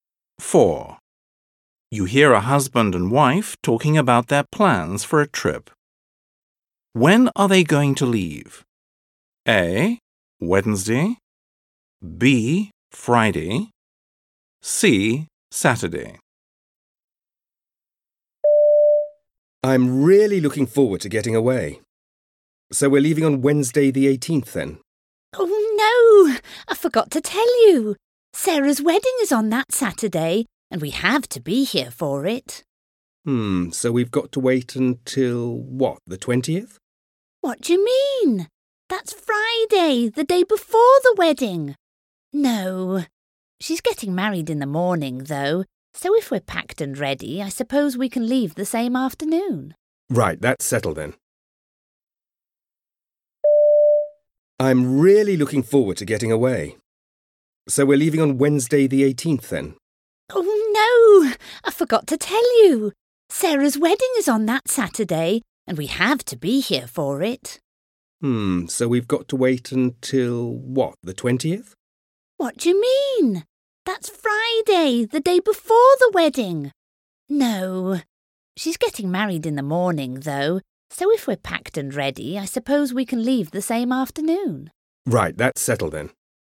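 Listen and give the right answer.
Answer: C: Saturday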